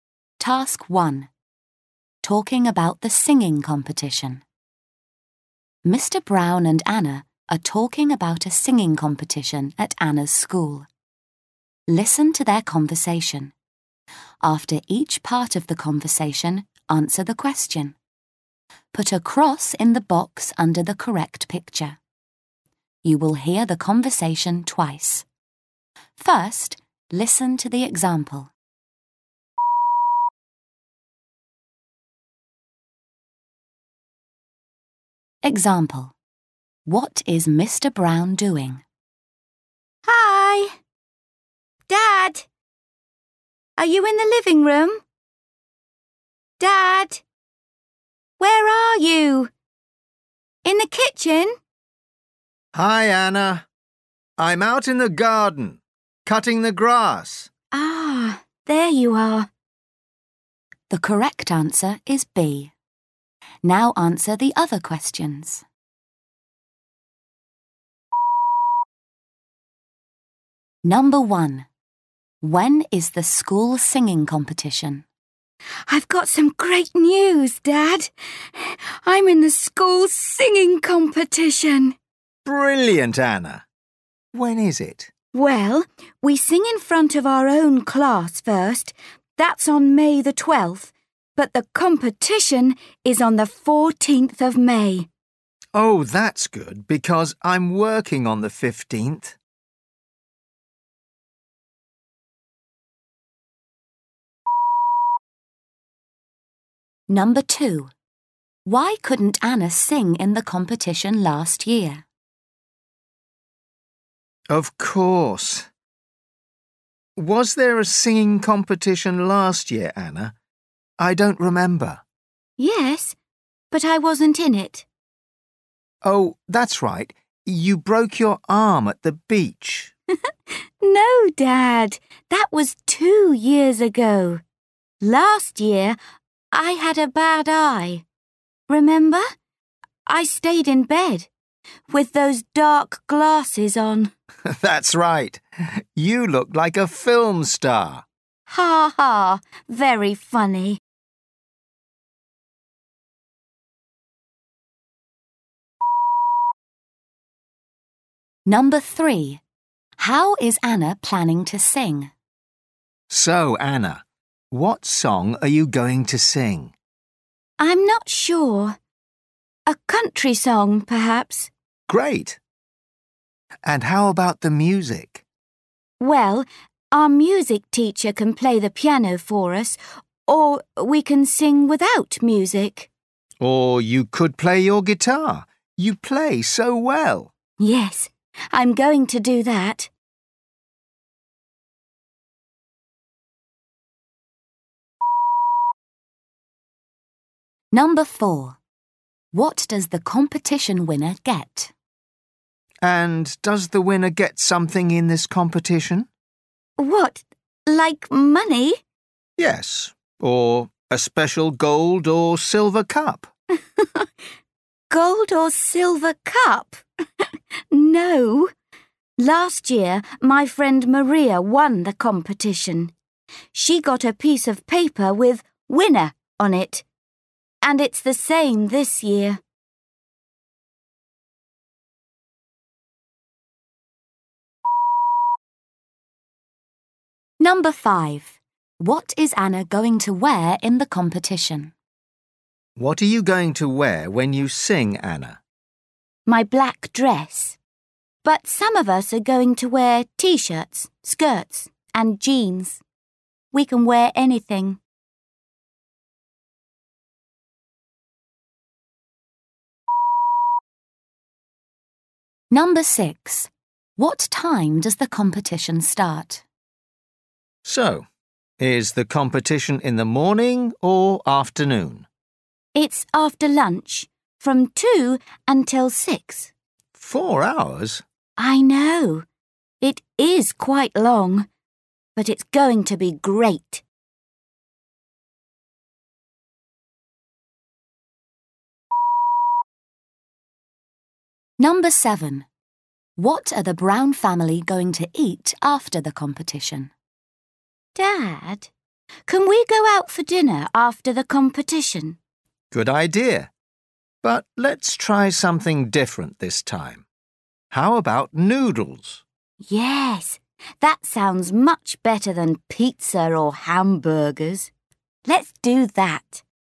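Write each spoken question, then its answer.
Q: When is the school singing competition?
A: On the 14th of May

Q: Why couldn't Anna sing in the competition last year?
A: She had a bad eye

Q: How is Anna planning to sing?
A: Playing her guitar

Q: What does the competition winner get?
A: A piece of paper with winner on it

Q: What is Anna going to wear in the competition?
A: Her black dress

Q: What time does the competition start?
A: At 2 o'clock

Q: What are the Brown family going to eat after the competition?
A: Noodles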